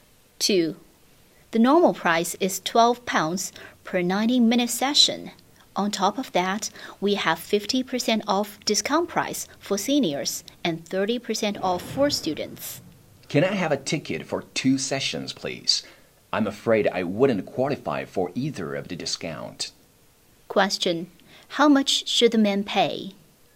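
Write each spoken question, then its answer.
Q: How much should the man pay?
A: £24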